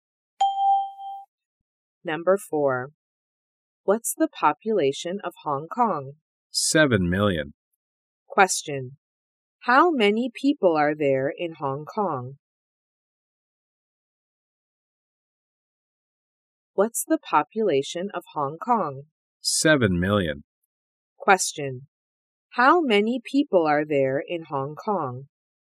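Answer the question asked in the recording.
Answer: 7 million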